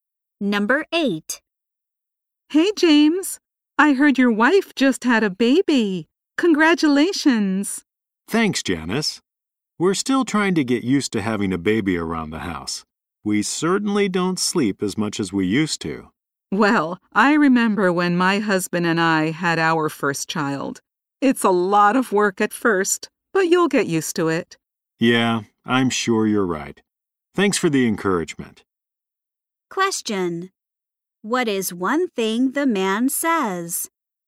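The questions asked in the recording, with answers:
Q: What is one thing the man says?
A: He and his wife don't sleep as much as they used to.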